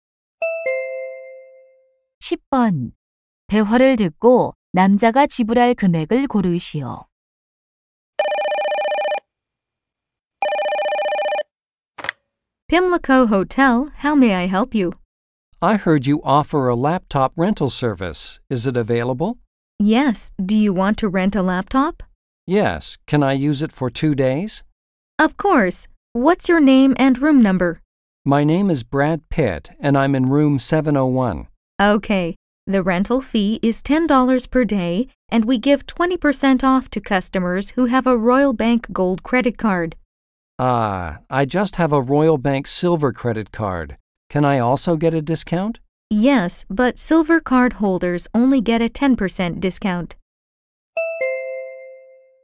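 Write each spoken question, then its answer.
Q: 대화를 듣고 남자가 지불할 금액을 고르시오.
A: 18달러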